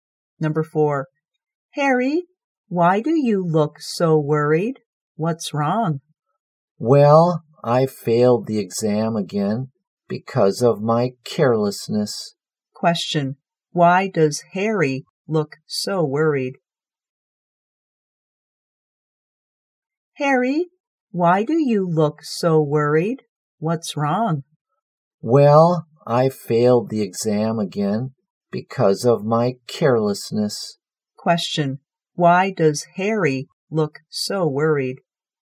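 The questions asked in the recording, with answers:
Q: why does Harry look so worried?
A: He failed the exam again because of his carelessness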